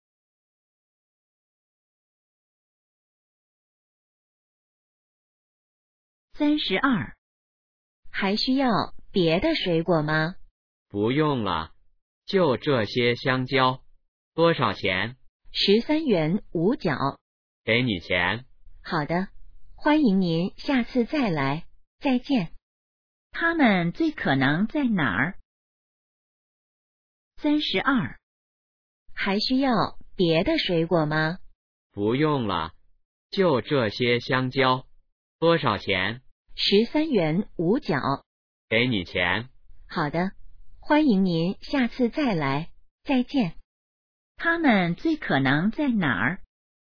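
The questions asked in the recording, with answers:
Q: 他们最可能在哪儿?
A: 水果店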